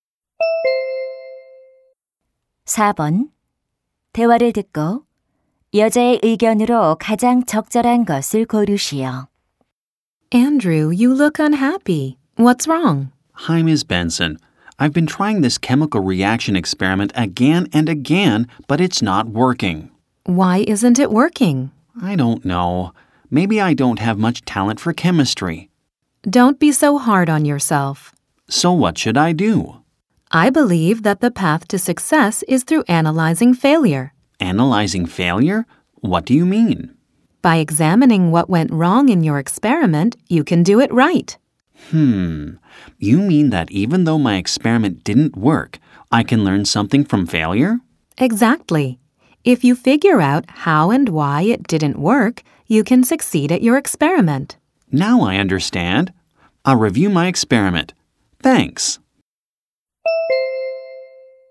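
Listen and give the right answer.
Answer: 실패를 분석하는 것이 성공으로 가는 길이다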